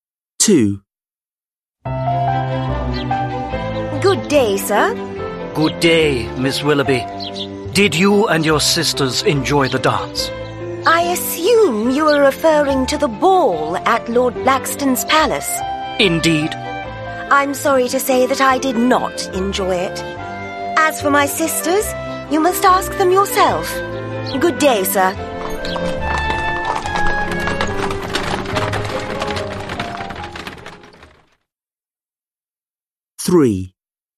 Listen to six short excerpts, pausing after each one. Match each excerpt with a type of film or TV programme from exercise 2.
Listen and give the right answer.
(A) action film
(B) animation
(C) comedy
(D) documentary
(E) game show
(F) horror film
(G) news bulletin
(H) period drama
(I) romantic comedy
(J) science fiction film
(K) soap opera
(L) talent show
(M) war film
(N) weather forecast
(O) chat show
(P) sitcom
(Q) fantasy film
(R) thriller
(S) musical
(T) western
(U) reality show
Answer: (H) period drama

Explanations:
Ann: Good day, sir. Joseph: Good day, Miss Willerby. Did you and your sisters enjoy the dance? Ann: I assume you are referring to the ball at Lord Blackstone's palace. Joseph: Indeed. Ann: I'm sorry to say that I did not enjoy it. As for my sisters, you must ask them yourself. Good day, sir!

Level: Lớp 10